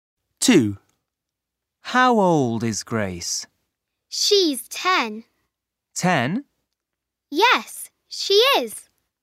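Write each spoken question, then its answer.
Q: How old is Grace?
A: 10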